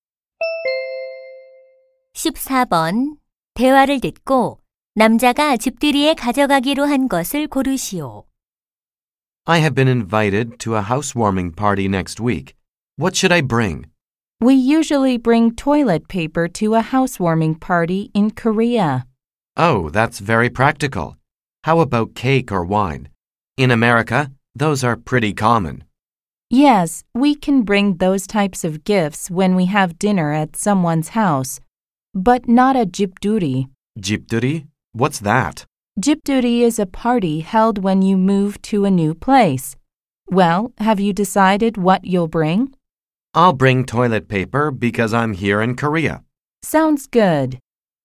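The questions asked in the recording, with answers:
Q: 대화를 듣고 남자가 집들이에 가져가기로 한 것을 고르시오.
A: 화장지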